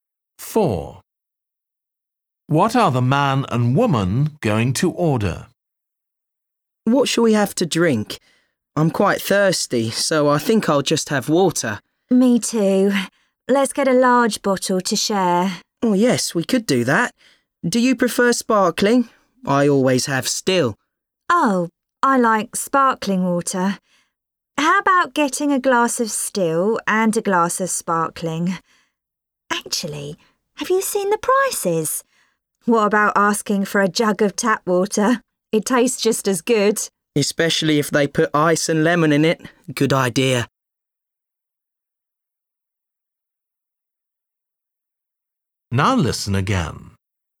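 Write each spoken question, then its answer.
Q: What are the man and woman going to order?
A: a jug of tap water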